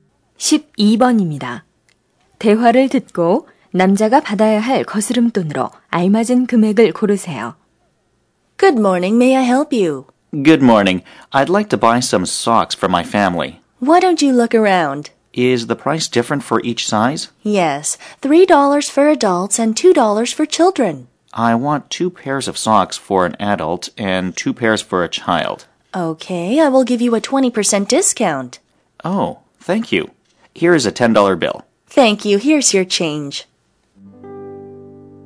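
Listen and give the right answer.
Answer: 2달러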